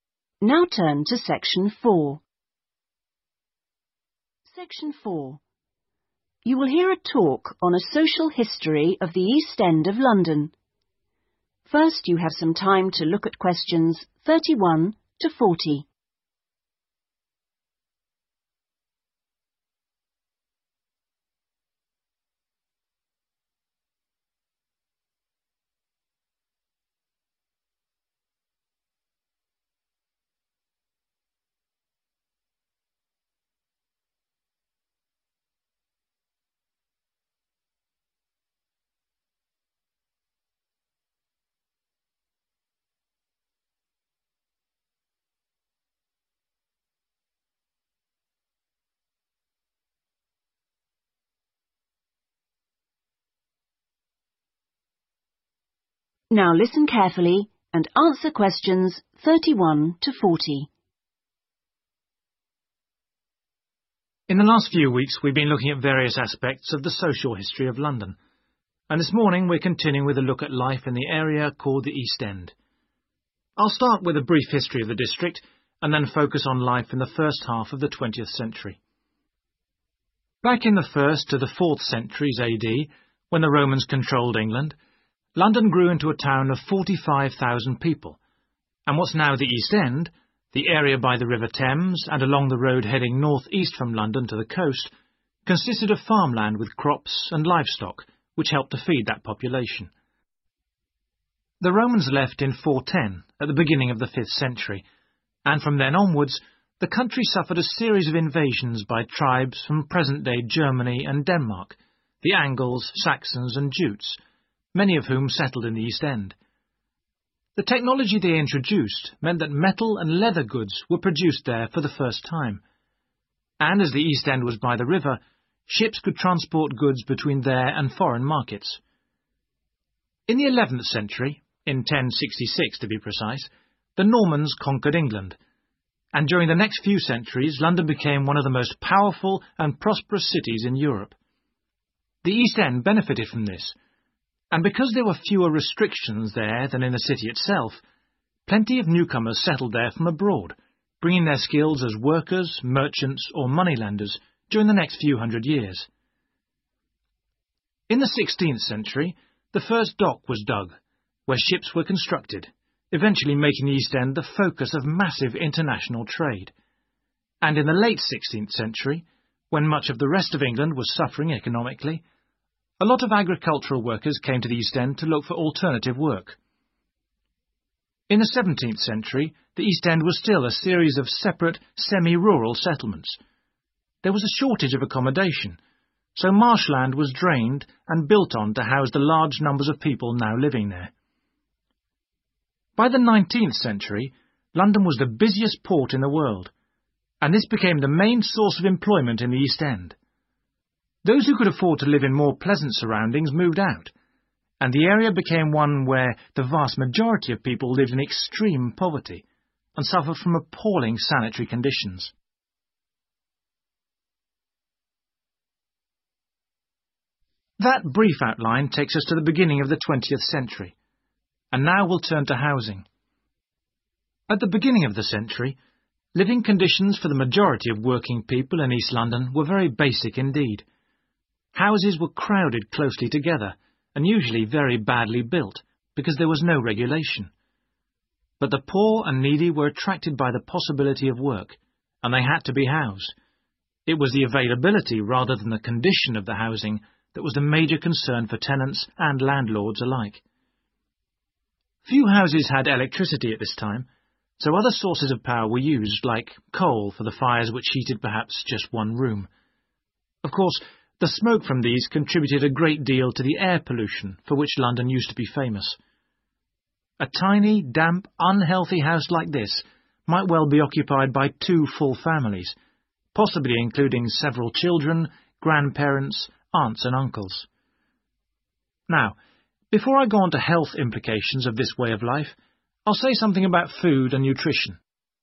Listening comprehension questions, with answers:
Complete the table below. Write NO MORE THAN TWO WORDS for each answer.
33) 11th century - Lack of......... in the East End encouraged the growth of businesses.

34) Construction of facilities for the building of ........ stimulated international trade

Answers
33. restrictions
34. shipS

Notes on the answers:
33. restrictions chú ý là fewer được paraphrase trong câu hỏi là lack và trước đó có nói là London became one of the most powerful and prosperous cities in Europe
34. Bắt đầu 20:12 là cần nghe kĩ " the first dock was dug where ships were constructed, eventually making the East End the focus of massive international trade" (IELTS TUTOR dịch: Bến cảng đầu tiên được đào tại nơi đóng tàu, cuối cùng khiến khu East End trở thành trung tâm của hoạt động thương mại quốc tế quy mô lớn) trong đó thấy là nếu ai điền đáp án là dock là sai vì cái này chỉ là sự chuẩn bị (trong câu hỏi paraphrase lại construction of facilities) để xây tàu, trong đó thấy các từ được paraphrase: